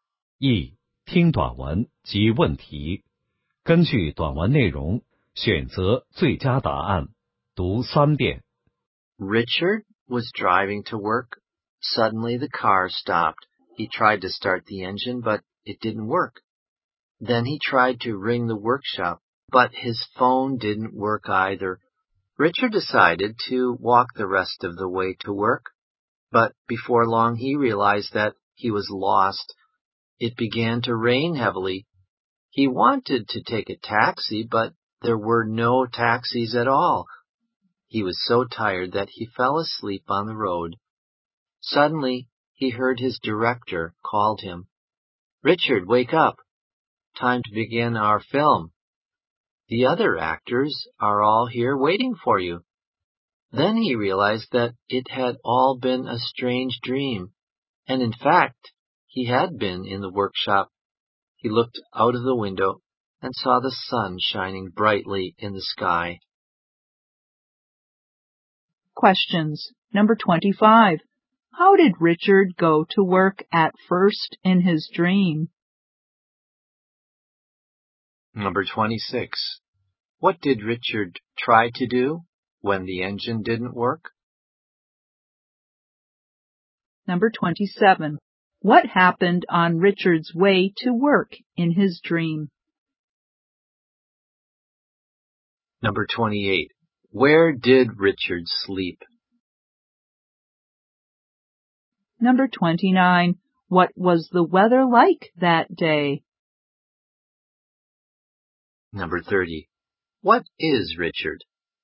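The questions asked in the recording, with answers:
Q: How did Richard go to work at first in his dream?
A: By car (he drove)

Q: What did Richard try to do when the engine didn't work?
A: Ring the workshop

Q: What is Richard?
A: An actor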